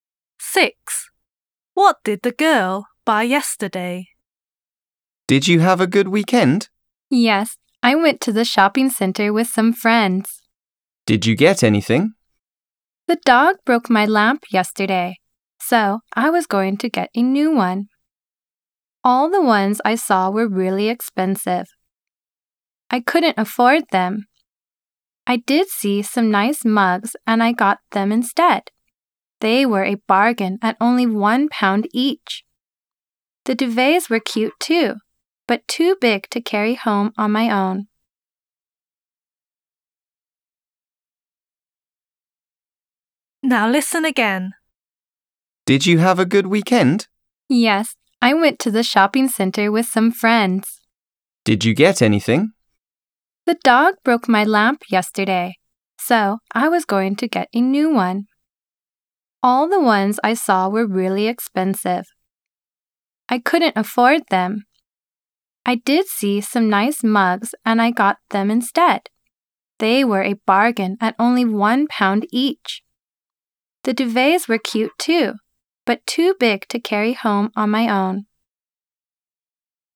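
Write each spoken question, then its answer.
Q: What did the girl buy yesterday?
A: mugs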